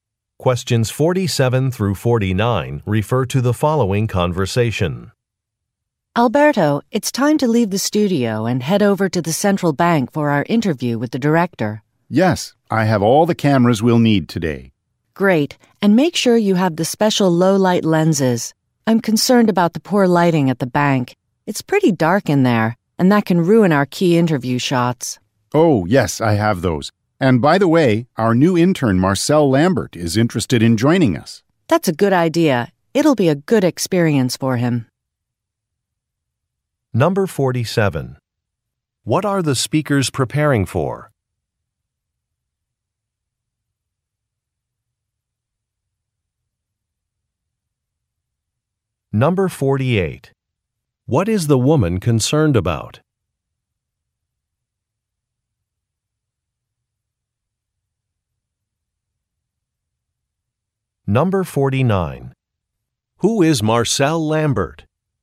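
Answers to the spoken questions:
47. Filming an interview with the central bank director
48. Poor lighting at the bank
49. A new intern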